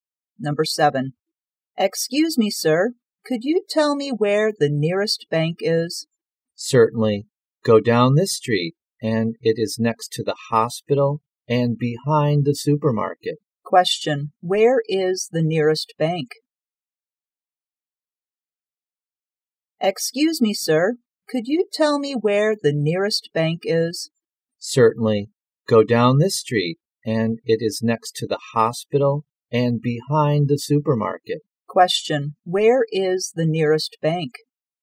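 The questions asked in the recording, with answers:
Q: Question, where is the nearest bank?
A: Next to the hospital and behind the supermarket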